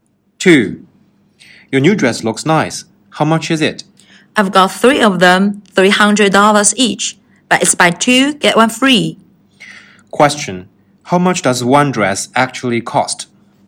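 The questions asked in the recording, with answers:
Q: How much does one dress actually cost?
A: $200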